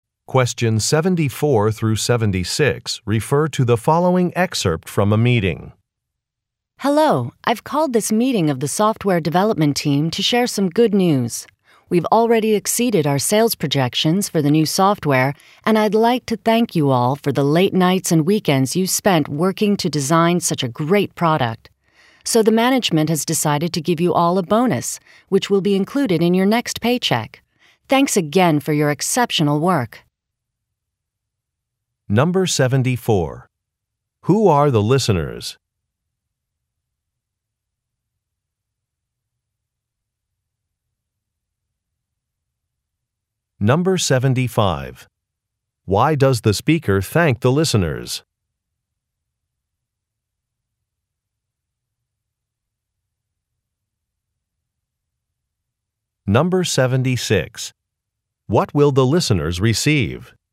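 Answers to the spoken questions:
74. The software development team
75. For working late nights and weekends to design a great product
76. A bonus in their next paycheck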